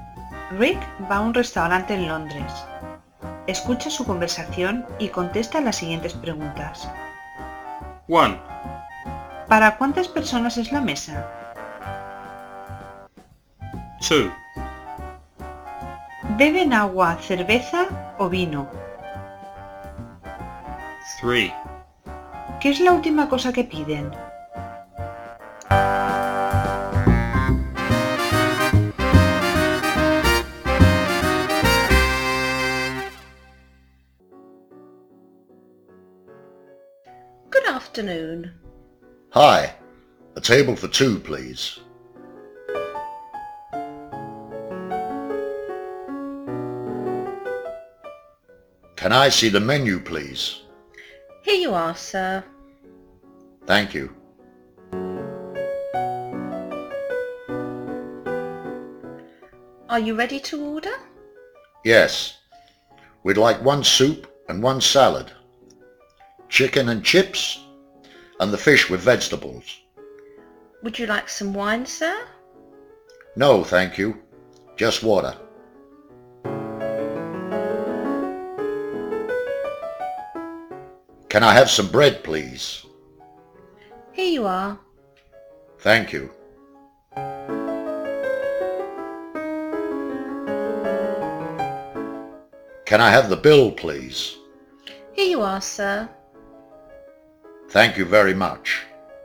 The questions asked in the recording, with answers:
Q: ¿Para cuántas personas es la mesa?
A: A table for two. Una mesa para dos.

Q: ¿Beben agua, cerveza o vino?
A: Just water. Beben solo agua.

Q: ¿Qué es la última cosa que piden?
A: La cuenta, por favor. Piden la cuenta.